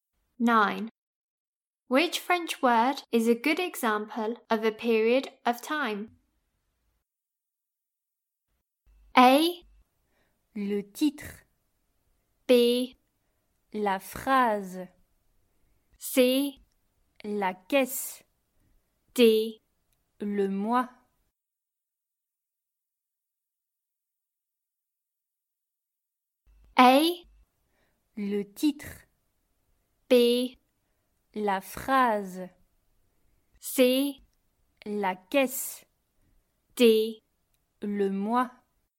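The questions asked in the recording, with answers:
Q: Which French word is a good example of a period of time?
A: D: Le mois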